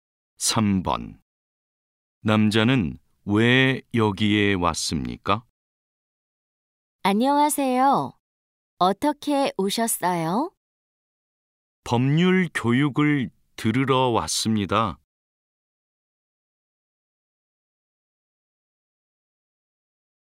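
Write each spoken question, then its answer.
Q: 남자는 왜 여기에 왔습니까?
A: 법률 교육을 들으러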